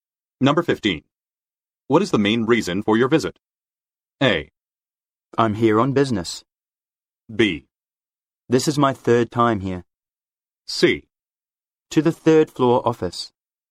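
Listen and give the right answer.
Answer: A: I'm here on business.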